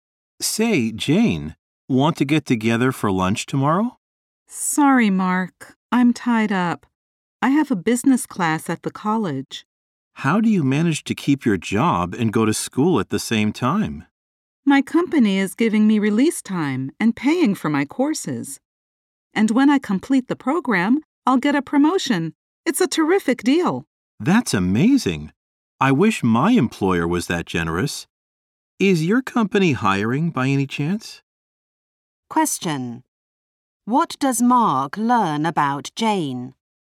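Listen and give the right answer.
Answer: Her company pays for her courses and gives her time off to study, and she'll be promoted when she finishes.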